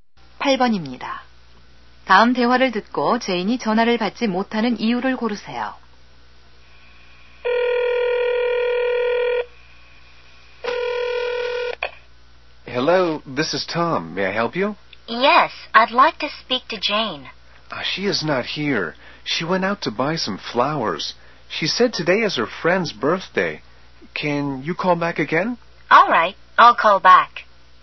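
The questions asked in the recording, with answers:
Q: 다음 대화를 듣고 제인이 전화를 받지 못하는 이유를 고르세요.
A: 꽃을 사러 나가서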